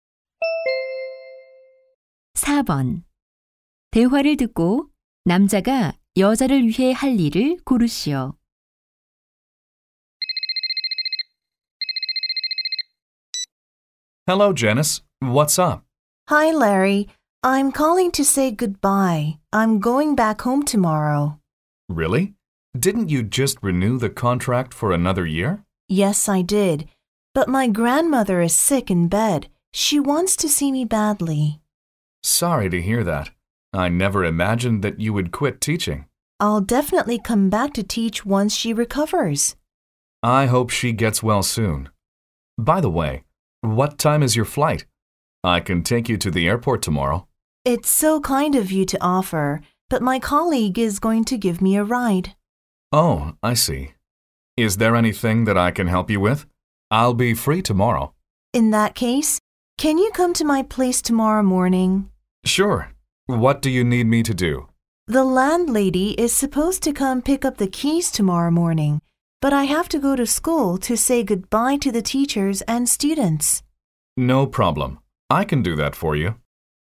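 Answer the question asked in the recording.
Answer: 집주인에게 열쇠 전달하기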